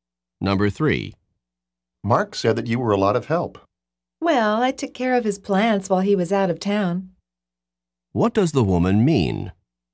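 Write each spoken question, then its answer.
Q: What does the woman mean?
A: She looked after Mark's plants while he was away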